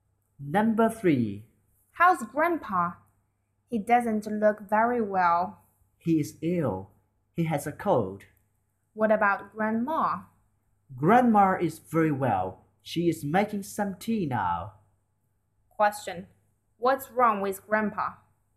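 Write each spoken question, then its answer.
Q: What's wrong with Grandpa?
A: He has a cold.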